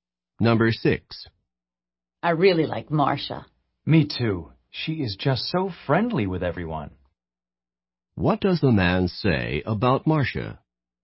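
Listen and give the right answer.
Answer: She is friendly with everyone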